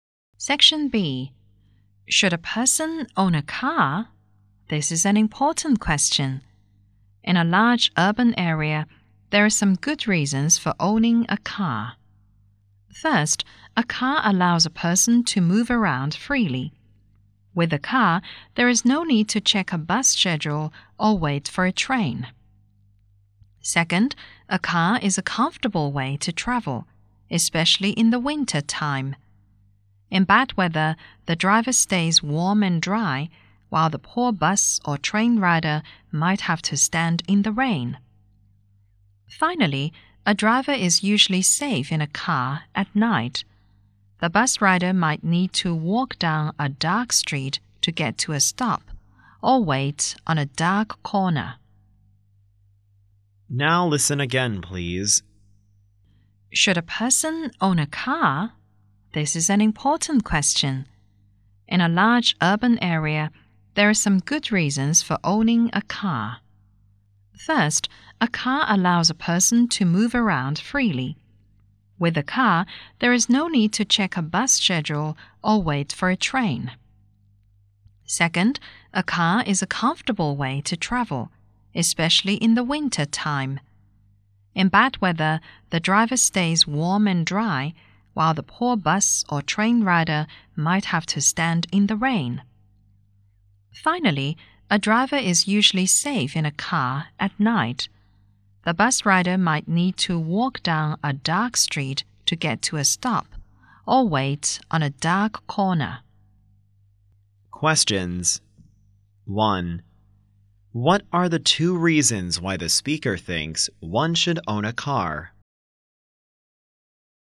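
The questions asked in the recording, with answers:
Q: What are the 2 reasons why the speaker thinks one should own a car?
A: A car lets a person move around freely and is a comfortable way to travel (it is also safer at night).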